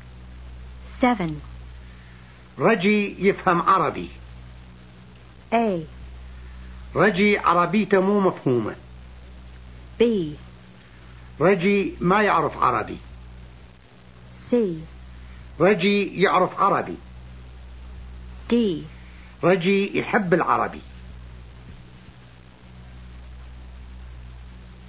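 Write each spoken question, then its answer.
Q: رجي يفهم عربي.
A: C: رجي يعرف عربي.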